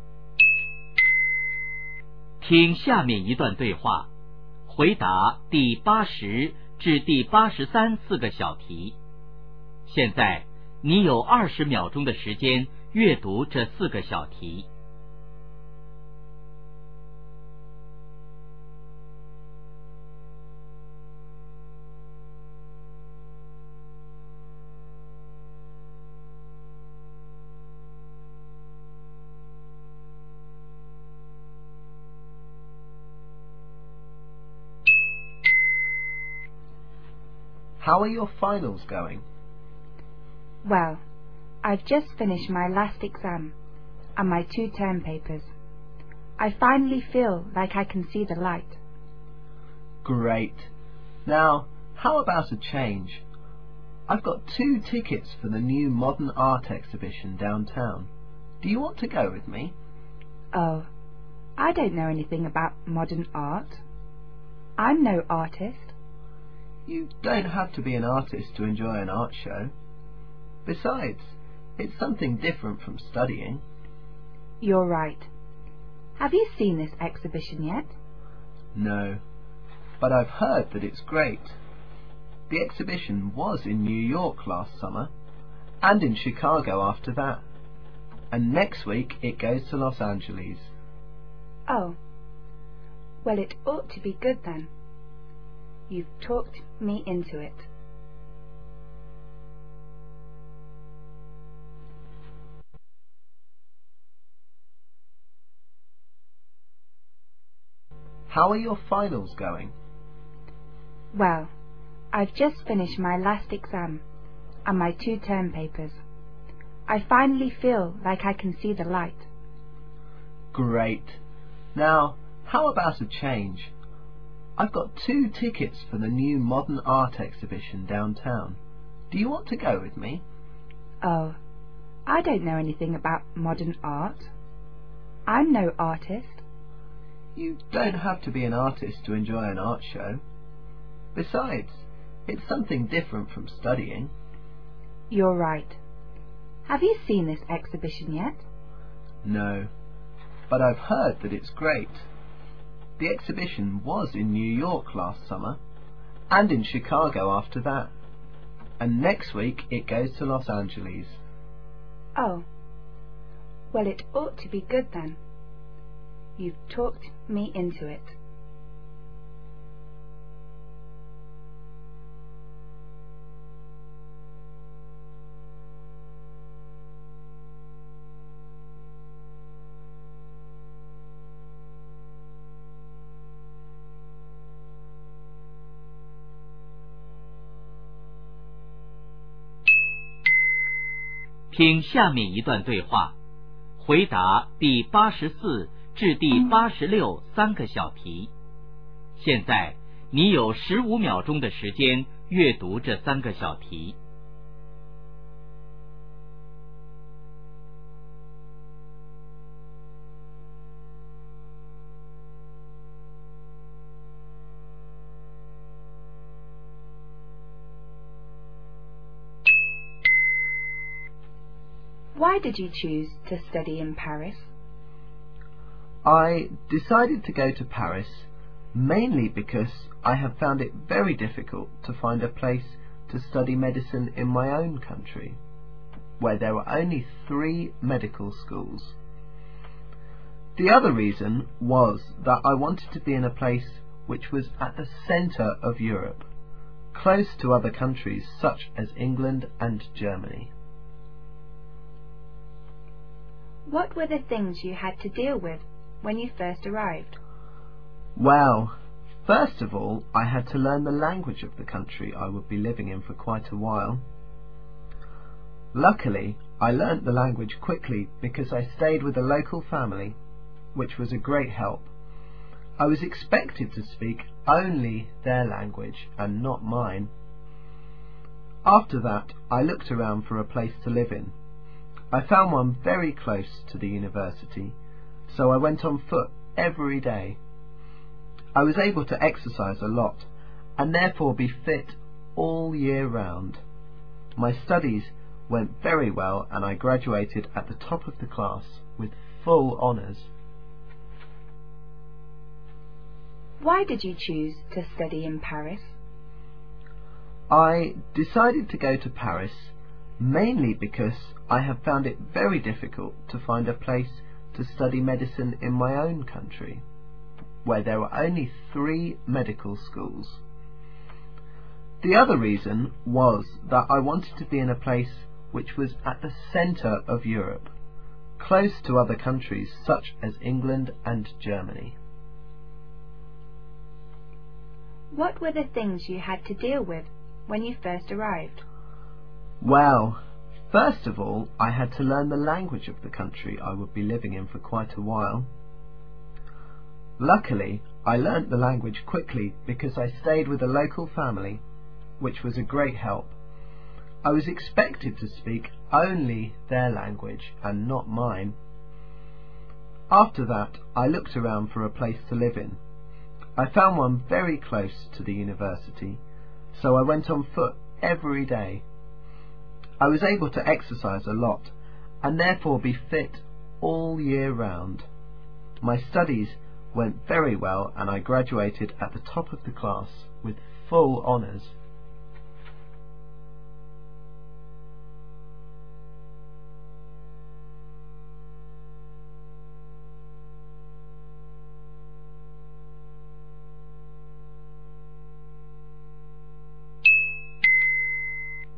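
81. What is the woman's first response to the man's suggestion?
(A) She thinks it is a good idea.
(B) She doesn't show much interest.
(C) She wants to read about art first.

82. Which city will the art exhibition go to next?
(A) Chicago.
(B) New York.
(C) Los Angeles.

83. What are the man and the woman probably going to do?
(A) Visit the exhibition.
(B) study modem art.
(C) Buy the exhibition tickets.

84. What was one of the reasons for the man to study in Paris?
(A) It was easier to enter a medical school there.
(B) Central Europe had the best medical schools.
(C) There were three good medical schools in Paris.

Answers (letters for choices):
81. B
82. C
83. A
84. A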